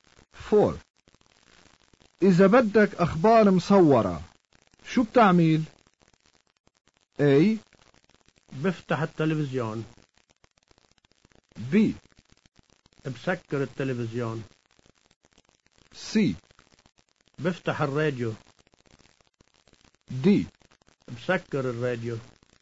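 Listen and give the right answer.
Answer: A: بفتح التلفزيون.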